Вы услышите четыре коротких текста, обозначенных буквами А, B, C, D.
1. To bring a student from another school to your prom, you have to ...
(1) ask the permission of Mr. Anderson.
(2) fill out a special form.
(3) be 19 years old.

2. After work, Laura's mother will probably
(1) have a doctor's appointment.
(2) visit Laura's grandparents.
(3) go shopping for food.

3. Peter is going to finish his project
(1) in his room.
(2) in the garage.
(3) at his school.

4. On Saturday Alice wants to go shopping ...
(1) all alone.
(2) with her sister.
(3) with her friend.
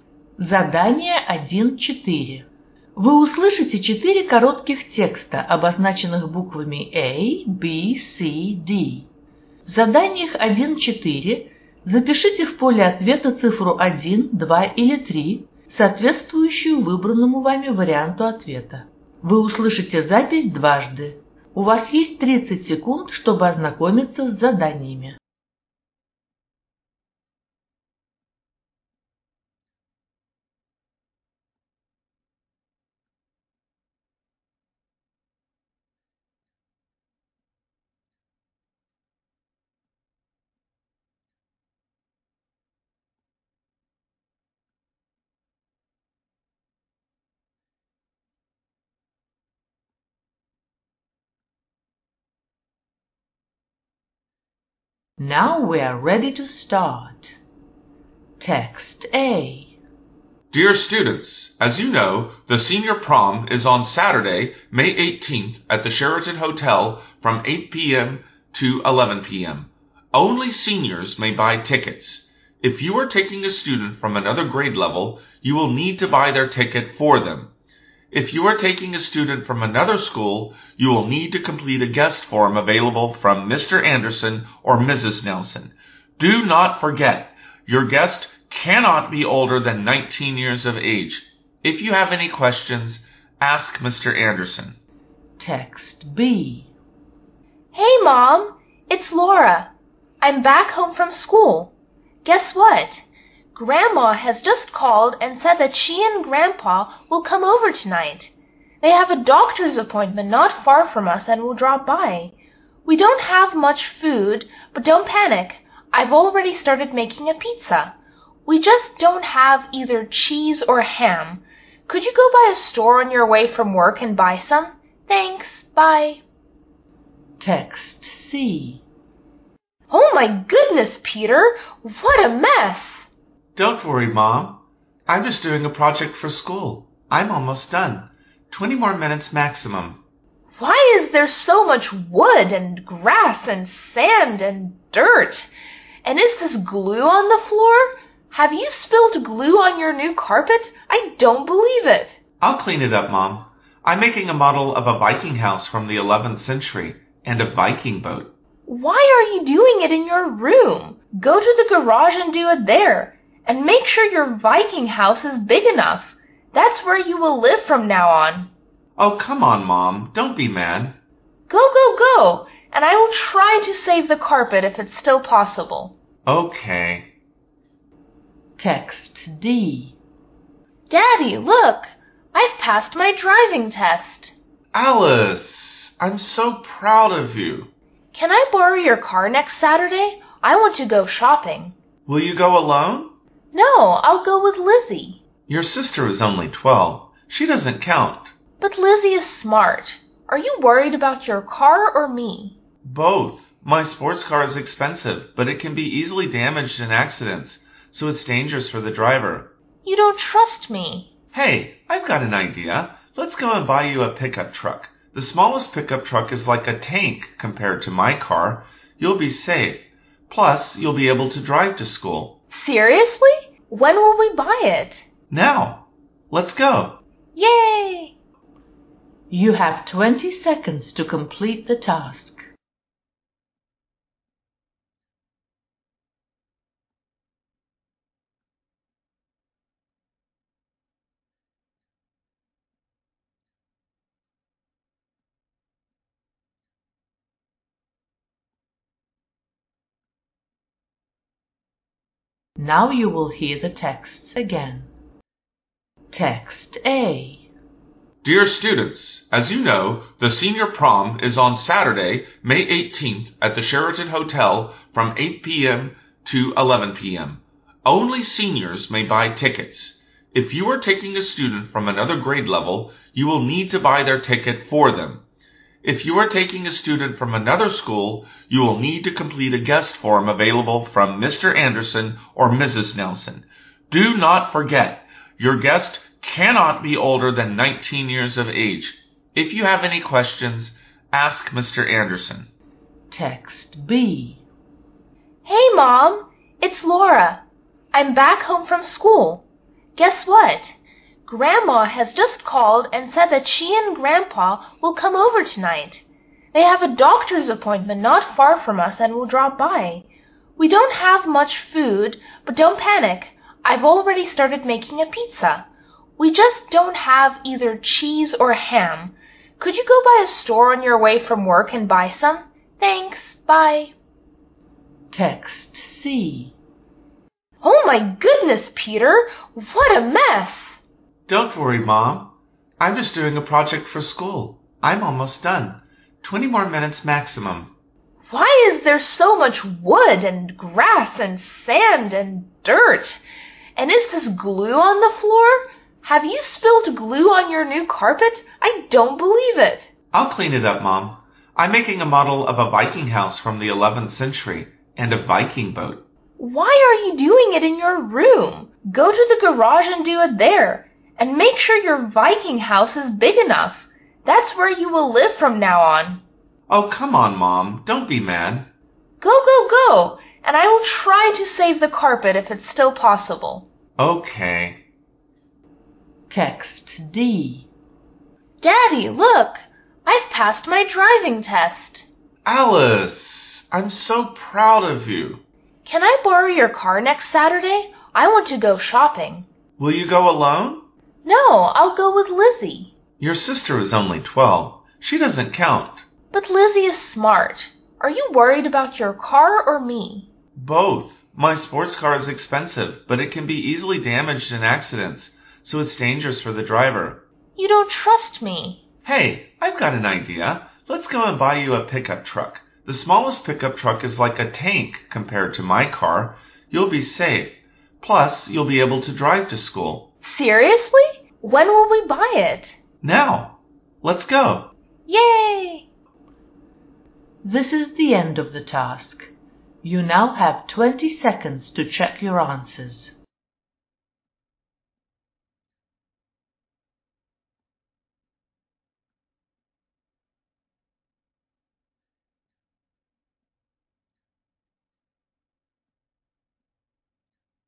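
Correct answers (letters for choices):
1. 2
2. 3
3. 2
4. 2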